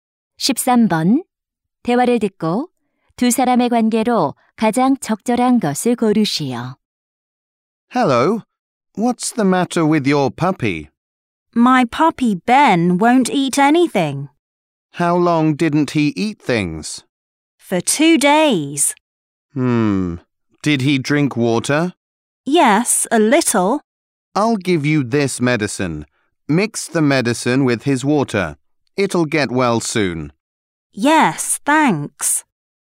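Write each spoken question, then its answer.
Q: 대화를 듣고 두 사람의 관계로 가장 적절한 것을 고르시오.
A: 수의사와 반려견 주인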